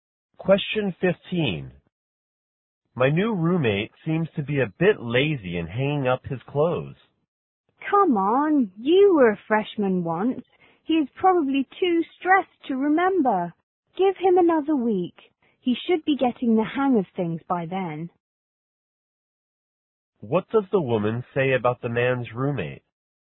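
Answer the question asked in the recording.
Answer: He needs more time to adjust; he will get used to things soon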